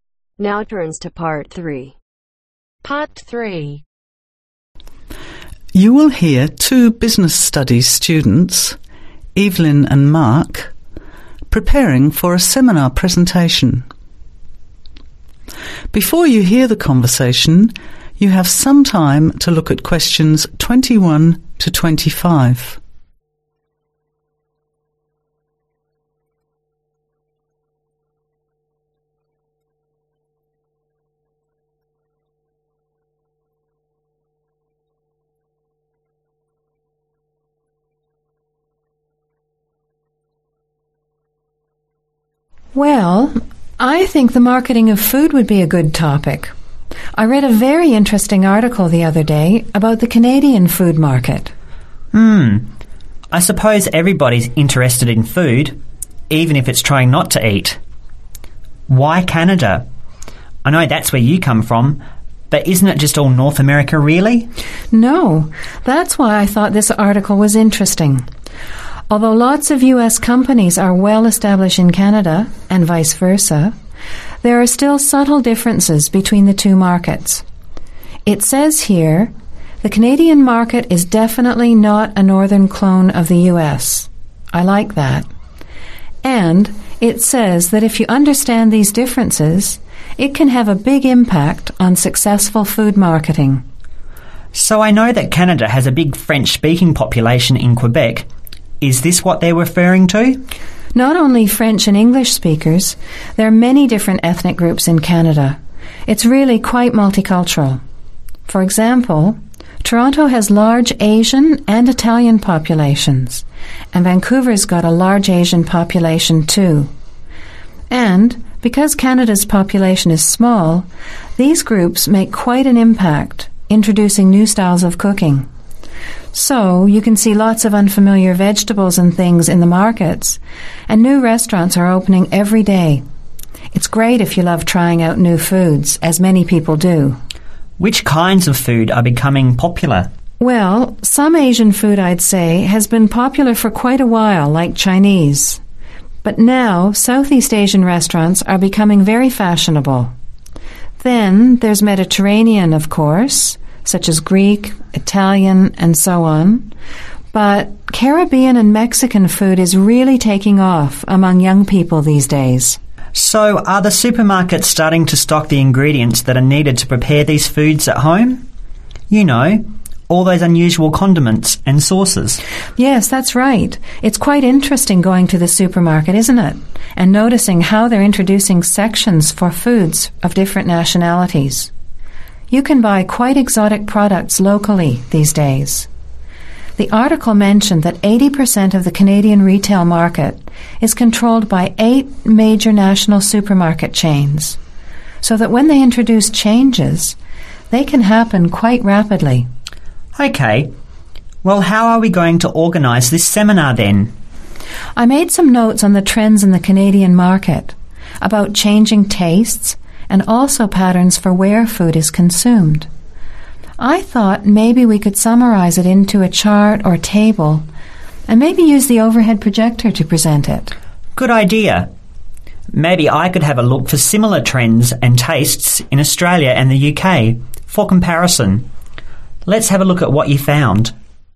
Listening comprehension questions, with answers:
Complete the notes below. Write ONE WORD ONLY for each answer.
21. Understanding subtle (21)............ between the Canadian and United States food sectors is important for successful food marketing.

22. Toronto has large (22)............ and Asian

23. and (23)............ foods.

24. Therefore demand is increasing for new (24)............ to prepare these foods plus condiments and sauces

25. Seminar to compare Canadian food trends with (25)............ and UK.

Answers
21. differences
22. Italian
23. Mexican
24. Ingredients
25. Australia